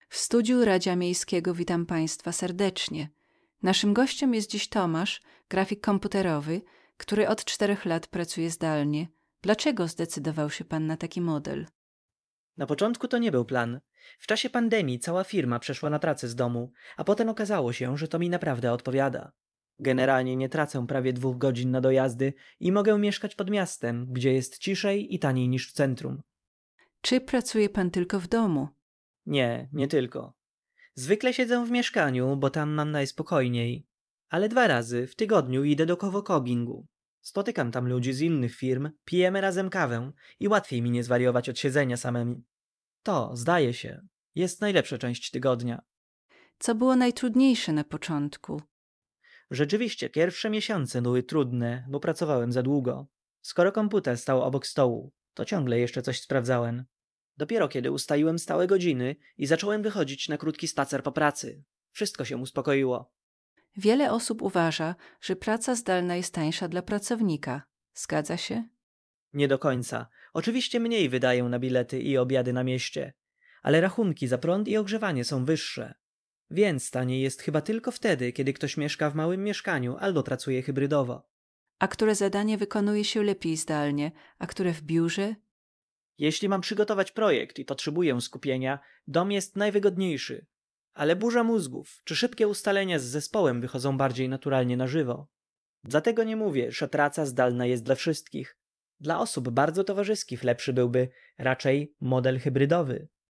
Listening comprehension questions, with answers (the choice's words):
III. Proszę wysłuchać wywiadu i – zgodnie z przykładem – zaznaczyć właściwe odpowiedzi. Uwaga! Nagranie zostanie odtworzone dwa razy.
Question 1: Gość został przy pracy zdalnej, ponieważ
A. oszczędza czas na dojazdach.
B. jego firma zlikwidowała biuro.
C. chce codziennie pracować w centrum miasta.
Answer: oszczędza czas na dojazdach.

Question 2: Miejsce pracy Tomasza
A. to wyłącznie coworking.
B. to głównie dom, a czasem coworking.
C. zmienia się każdego dnia.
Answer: to głównie dom, a czasem coworking.

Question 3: Wynika z wywiadu, że na początku Tomasz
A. nie miał odpowiednich warunków w mieszkaniu.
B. pracował dłużej, niż planował.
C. często spóźniał się na spotkania online.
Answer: pracował dłużej, niż planował.

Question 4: Praca z domu a koszty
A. jest zawsze tańsza od pracy w biurze.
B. opłaca się tylko osobom, które często jedzą w restauracjach.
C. nie zawsze oznacza mniejsze wydatki.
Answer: nie zawsze oznacza mniejsze wydatki.

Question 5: Gość mówi, że osoby bardzo towarzyskie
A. powinny szukać pracy tylko w biurze.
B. mogą lepiej czuć się w modelu hybrydowym.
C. najłatwiej przyzwyczają się do pracy z domu.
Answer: mogą lepiej czuć się w modelu hybrydowym.